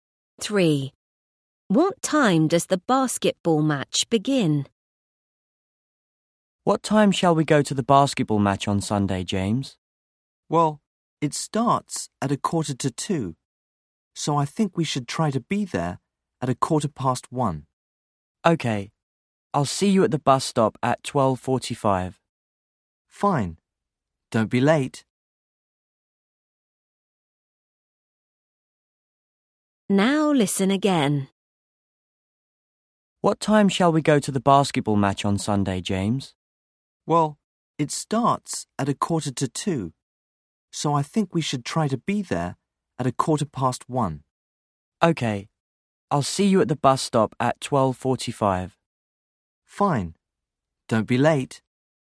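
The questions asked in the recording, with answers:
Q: What time does the basketball match begin?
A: 1:45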